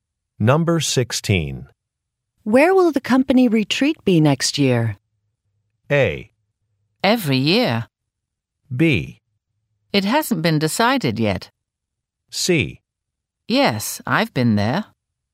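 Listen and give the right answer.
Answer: B: It hasn't been decided yet.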